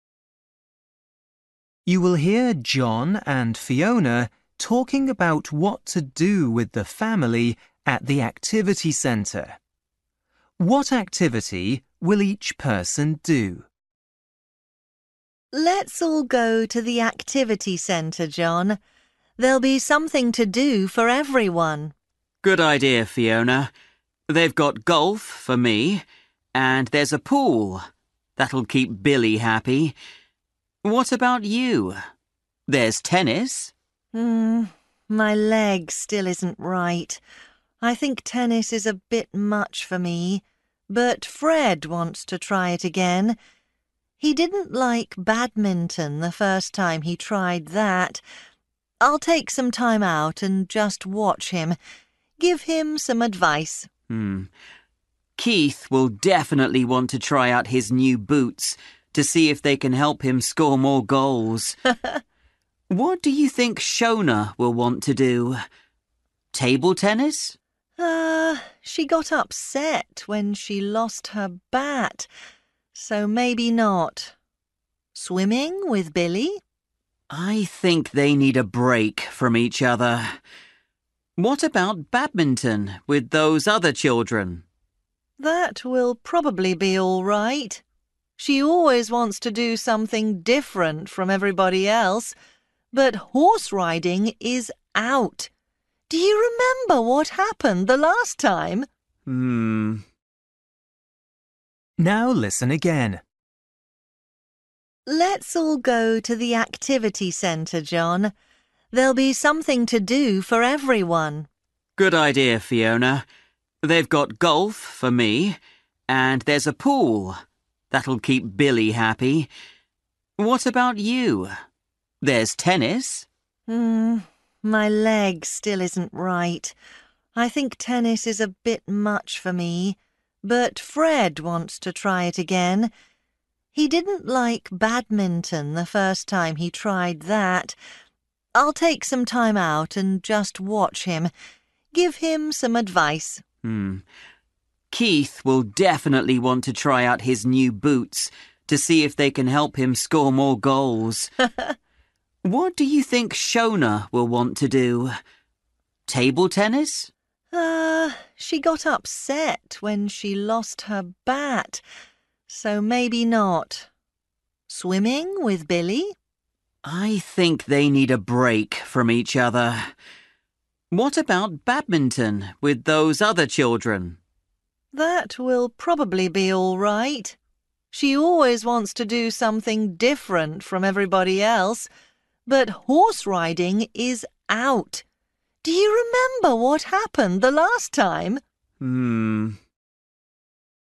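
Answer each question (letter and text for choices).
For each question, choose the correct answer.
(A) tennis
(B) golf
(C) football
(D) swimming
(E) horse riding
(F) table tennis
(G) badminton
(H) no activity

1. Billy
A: (D) swimming

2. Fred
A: (A) tennis

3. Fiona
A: (H) no activity

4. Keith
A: (C) football

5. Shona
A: (G) badminton

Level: Luyện nghe trình độ A2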